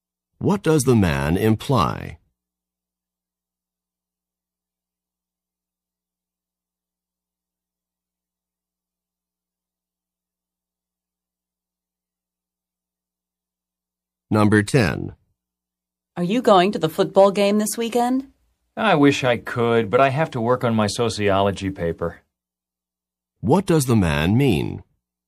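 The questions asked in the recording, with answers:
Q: What does the man mean?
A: He can't go to the game because he has to work on his paper.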